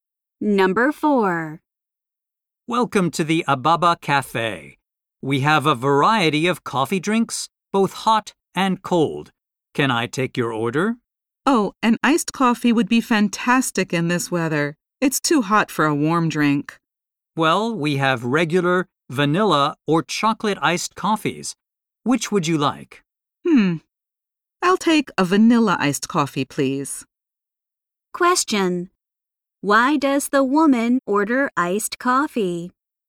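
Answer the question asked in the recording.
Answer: It's too hot for a warm drink.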